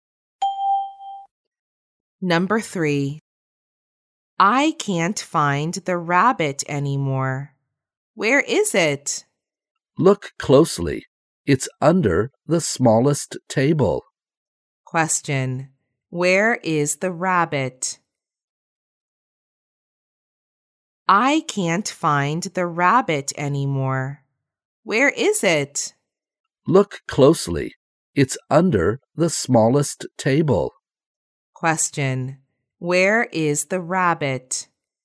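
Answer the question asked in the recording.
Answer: Under the smallest table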